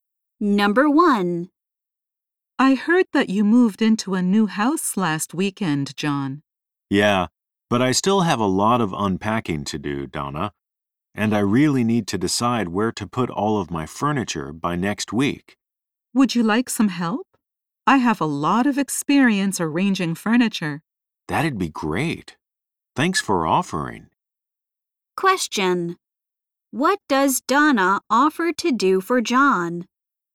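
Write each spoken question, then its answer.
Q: What does Donna offer to do for John?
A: Help him arrange his furniture.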